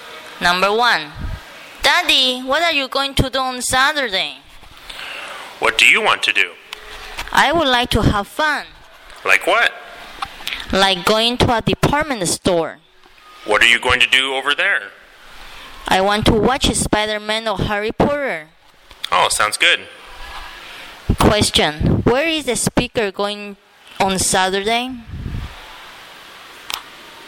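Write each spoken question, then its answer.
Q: Question, where is the speaker going on Saturday?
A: To a department store (to watch a movie)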